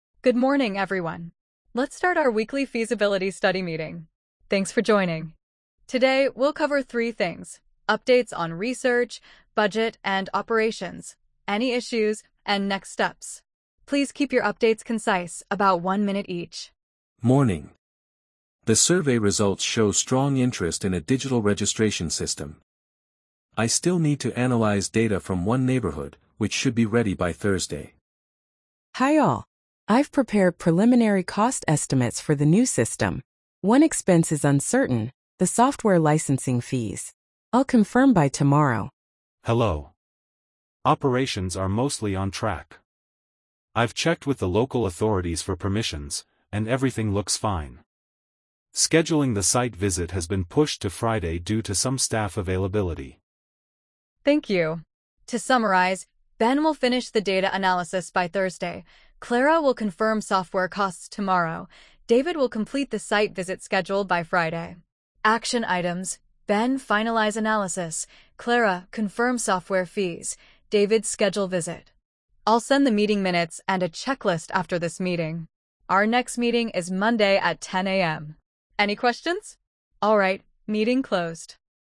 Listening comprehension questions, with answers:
Complete the phrases as you listen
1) Let's start our weekly ______ study meeting.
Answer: feasibility

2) Please keep your updates ______, about one minute each.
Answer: concise

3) The survey results show strong interest in a digital ______ system.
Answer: registration

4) I've prepared ______ cost estimates for the new system.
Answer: preliminary

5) One expense is uncertain, the software ______ fees.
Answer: licensing

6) I've checked with the local ______ for permissions.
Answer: authorities

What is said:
ANNA: Good morning, everyone. Let's start our weekly feasibility study meeting. Thanks for joining.
ANNA: Today, we'll cover three things: updates on research, budget, and operations; any issues; and next steps. Please keep your updates concise, about one minute each.
BEN: Morning. The survey results show strong interest in a digital registration system. I still need to analyze data from one neighborhood, which should be ready by Thursday.
CLARA: Hi all. I've prepared preliminary cost estimates for the new system. One expense is uncertain, the software licensing fees. I'll confirm by tomorrow.
DAVID: Hello. Operations are mostly on track. I've checked with the local authorities for permissions, and everything looks fine. Scheduling the site visit has been pushed to Friday due to some staff availability.
ANNA: Thank you. To summarize: Ben will finish the data analysis by Thursday; Clara will confirm software costs tomorrow; David will complete the site visit schedule by Friday. Action items: Ben finalize analysis; Clara confirm software fees; David schedule visit. I'll send the meeting minutes and a checklist after this meeting. Our next meeting is Monday at 10 a.m. Any questions?